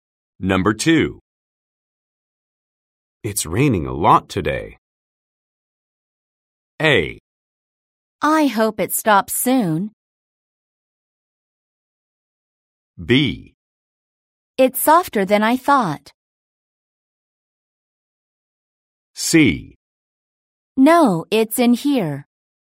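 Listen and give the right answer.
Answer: A: I hope it stops soon.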